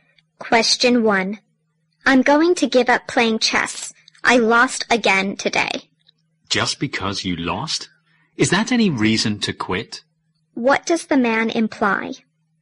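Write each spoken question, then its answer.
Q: What does the man imply?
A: Losing a game is no reason to give up playing chess.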